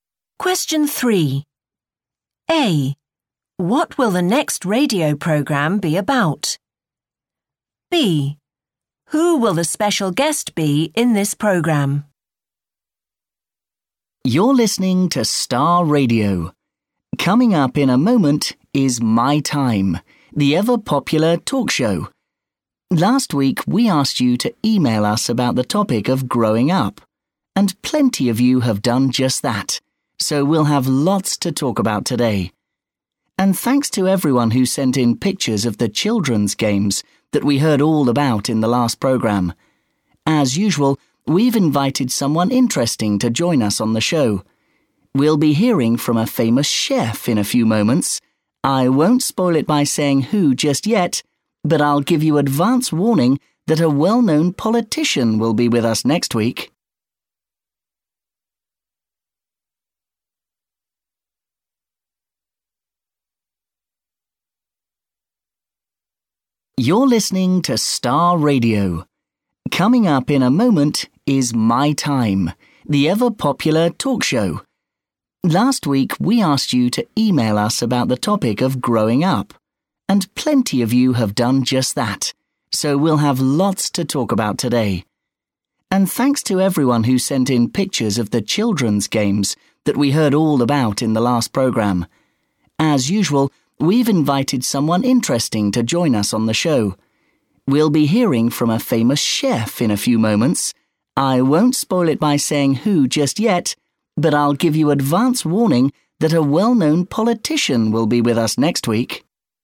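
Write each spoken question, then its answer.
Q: What will the next radio program be about?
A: growing up

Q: Who will the special guest be in this program?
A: a famous chef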